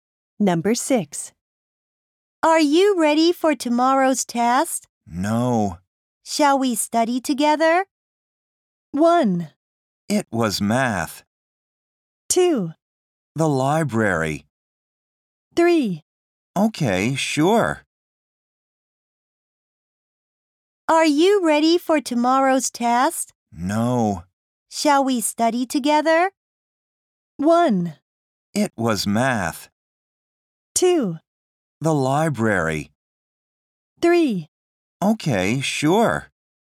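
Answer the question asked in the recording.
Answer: 3: Okay, sure.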